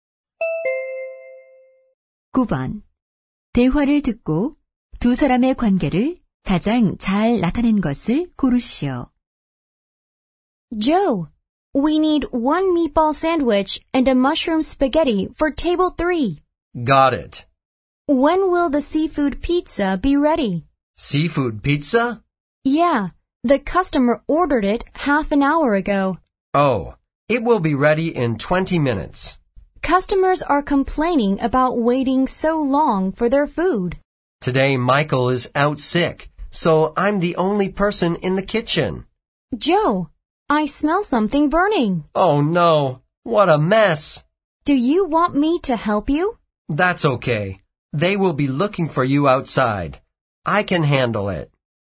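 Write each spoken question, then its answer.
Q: 대화를 듣고 두 사람의 관계를 가장 잘 나타낸 것을 고르시오.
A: 종업원과 요리사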